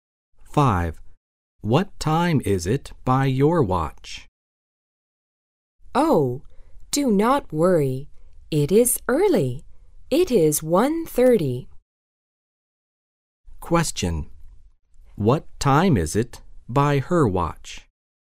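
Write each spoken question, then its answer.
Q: What time is it by her watch?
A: 1:30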